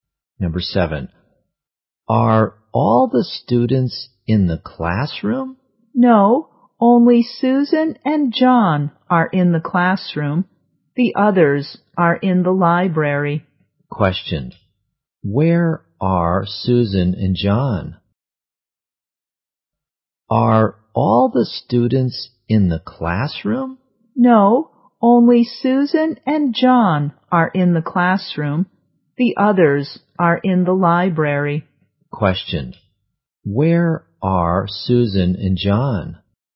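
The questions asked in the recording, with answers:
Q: where are Susan and John?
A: In the classroom.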